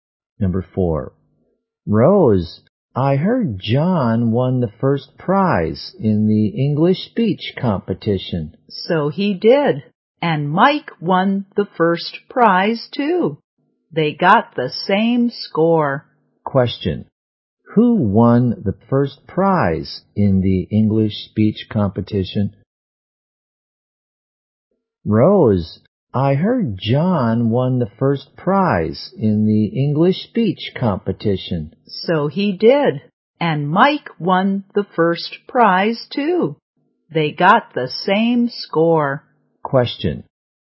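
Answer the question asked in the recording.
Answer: John and Mike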